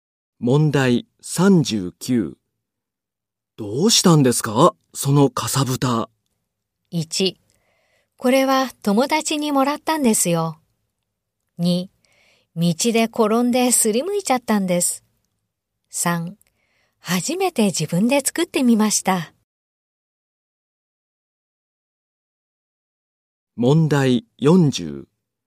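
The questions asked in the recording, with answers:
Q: どうしたんですか、そのかさぶた。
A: 2: 道で転んですりむいちゃったんです。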